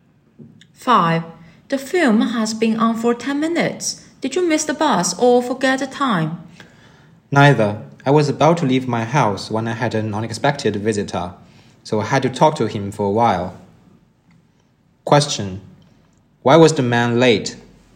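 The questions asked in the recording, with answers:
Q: Why was the man late?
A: He had an unexpected visitor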